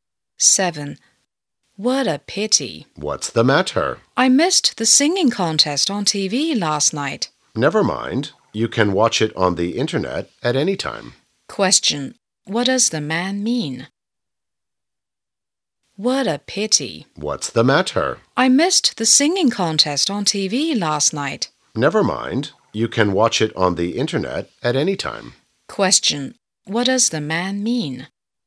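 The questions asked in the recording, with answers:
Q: What does the man mean?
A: She can watch the contest on the internet at any time.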